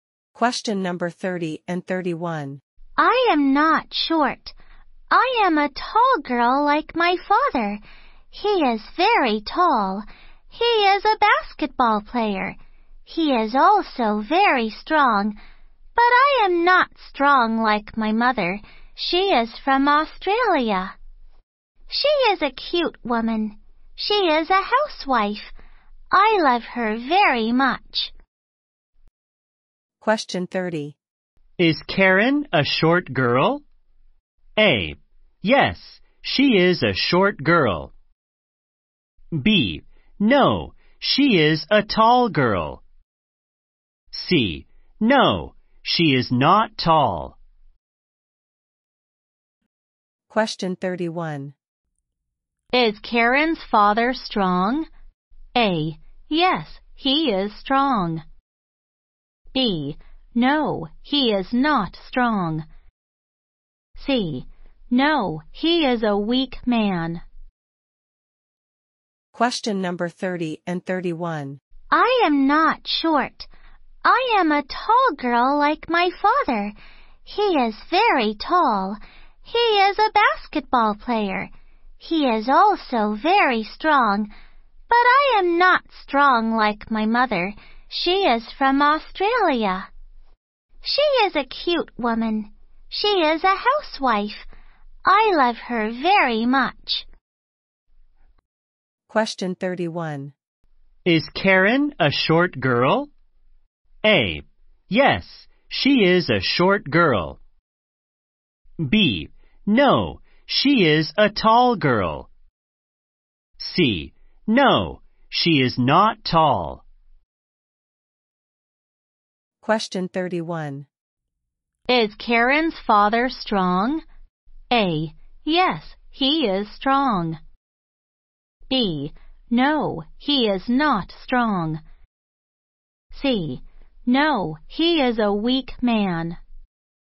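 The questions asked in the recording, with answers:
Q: Is Karen a short girl?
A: B: No, she is a tall girl.

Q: Is Karen's father strong?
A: A: Yes, he is strong.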